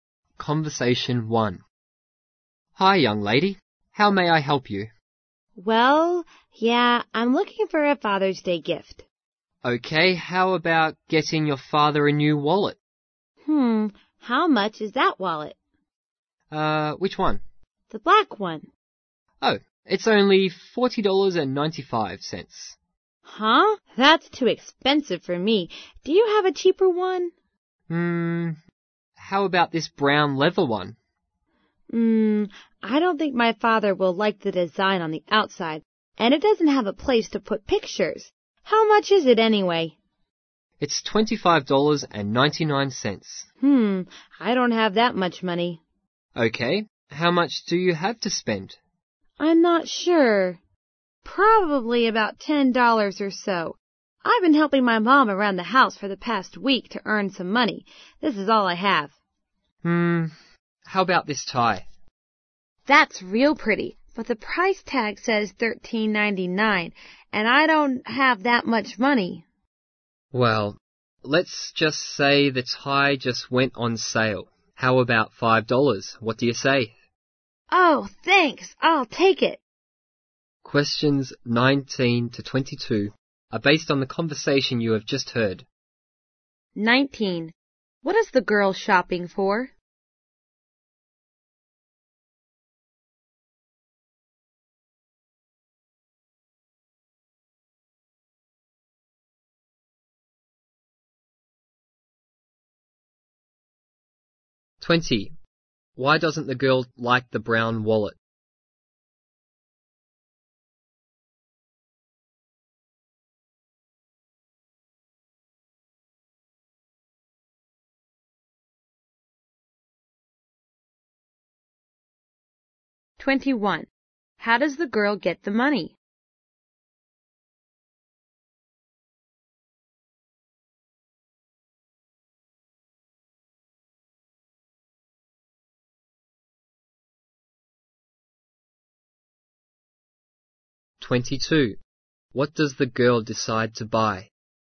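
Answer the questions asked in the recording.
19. A Father's Day gift
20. Her father won't like the design, and it has no place for pictures.
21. By helping her mom around the house
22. A tie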